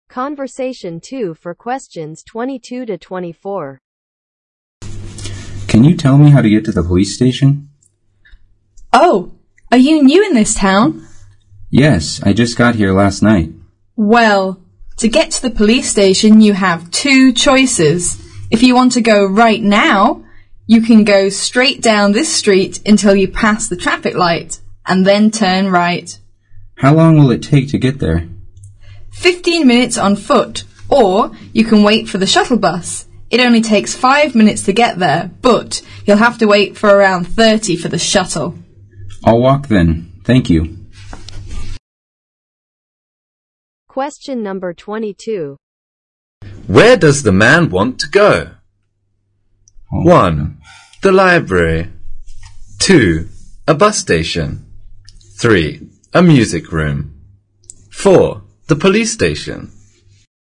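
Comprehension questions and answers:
Conversation 2 for questions 22 to 24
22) Where does the man want to go?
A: The police station

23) How long will it take the man to get to the police station if he walks?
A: 15 minutes

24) What did the man decide to do?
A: Walk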